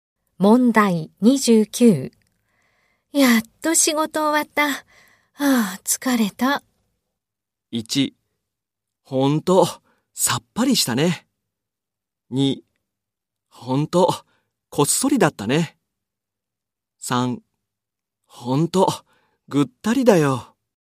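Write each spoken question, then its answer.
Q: やっと仕事終わった。ああ、疲れた。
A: 3: ほんと、ぐったりだよ。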